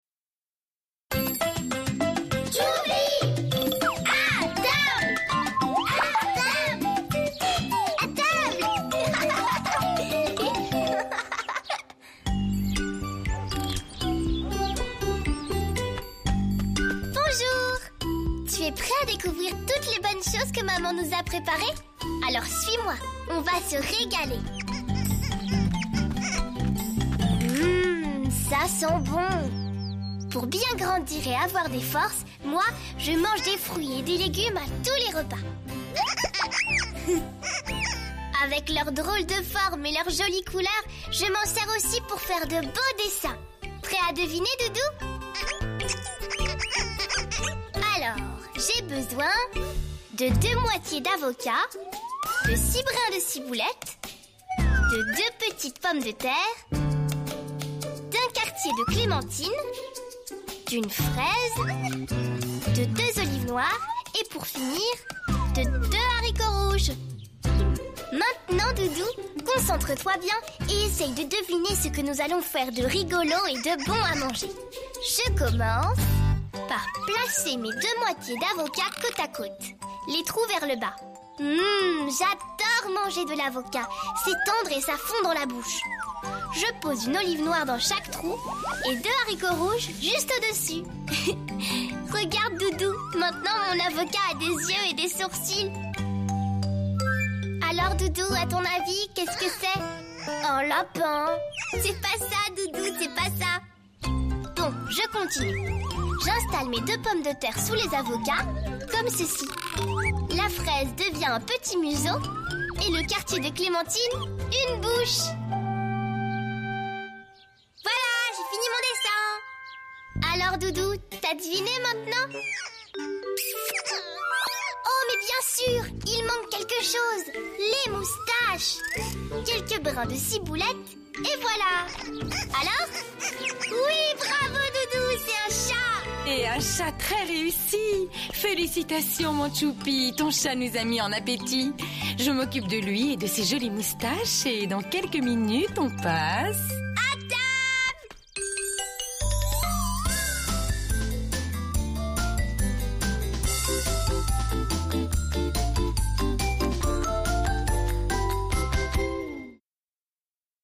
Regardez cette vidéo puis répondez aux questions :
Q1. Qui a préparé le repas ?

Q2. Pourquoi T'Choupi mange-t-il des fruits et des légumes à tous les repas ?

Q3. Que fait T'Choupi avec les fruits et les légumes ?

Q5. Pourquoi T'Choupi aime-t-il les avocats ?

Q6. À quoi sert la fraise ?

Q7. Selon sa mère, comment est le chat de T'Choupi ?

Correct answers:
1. Sa mère.
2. Pour avoir des forces.
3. Il fait des (beaux) dessins.
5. Parce que c'est tendre et ça fond dans la bouche.
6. Pour faire un museau (le nez de l'animal).
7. Il est très réussi

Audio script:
Tu es prêt à découvrir toutes les bonnes choses que maman nous a préparées ? Alors, suis-moi, on va se régaler. Mmm, ça sent bon. Pour bien grandir et avoir des forces, moi je mange des fruits et des légumes à tous les repas. Avec leurs drôles de formes et leurs jolies couleurs, je m'en sers aussi pour faire de beaux dessins. Prêt à deviner Doudou ? Alors, j'ai besoin de deux moitiés d'avocat, de six brins de ciboulettes, de deux petites pommes de terre, d'un quartier de clémentine, d'une fraise, de deux olives noires et pour finir de deux haricots rouges. Maintenant Doudou concentre-toi bien et essaie de deviner ce que nous allons faire de rigolo et de bon à manger. Je commence par placer mes deux moitiés d'avocat côte à côte, les trous vers le bas. Mmm, j'adore manger de l'avocat, c'est tendre et ça fond dans la bouche. Je pose une olive noire dans chaque trou et deux haricots rouges juste au-dessus. Regarde Doudou, maintenant mon avocat à des yeux et des sourcils. Alors Doudou, à ton avis, qu'est-ce que c'est ? Un lapin !? C'est pas ça Doudou, c'est pas ça. Bon, je continue. J'installe mes deux pommes de terre sous les avocats comme ceci. La fraise devient un petit museau et le quartier de clémentine... une bouche ! Voilà, j'ai fini mon dessin. Alors Doudou, t'as deviné maintenant ? Oh, mais bien sûr, il manque quelque chose... les moustaches ! Quelques brins de ciboulette et voilà ! Alors ? Oui, bravo Doudou, c'est un chat !
Sa mère : Et un chat très réussi ! Félicitations mon T'choupi, ton chat nous a mis en appétit. Je m'occupe de lui et de ses jolies moustaches et dans quelques minutes on passe...

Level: Niveaux : A1/A2